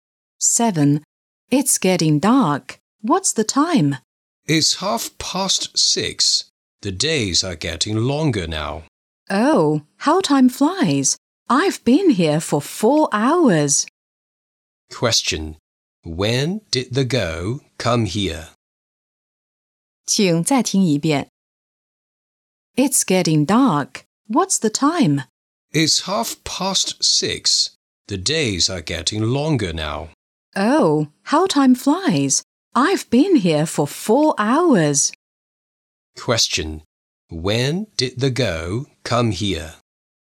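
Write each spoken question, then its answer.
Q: When did the girl come here?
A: At 2:30.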